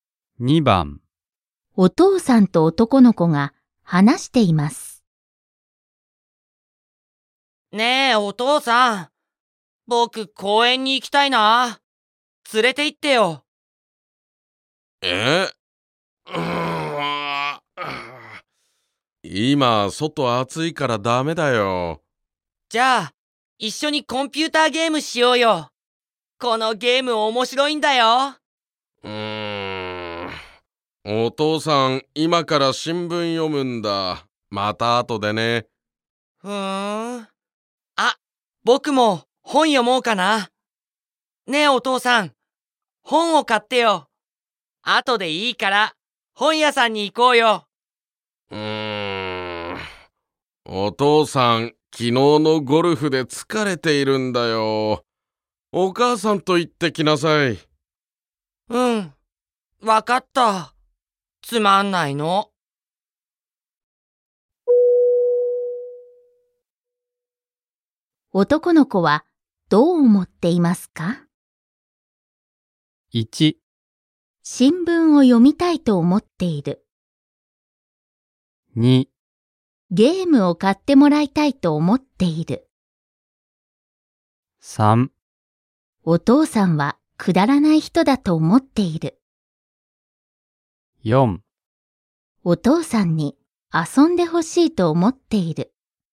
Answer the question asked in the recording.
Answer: なので、正解は4番です。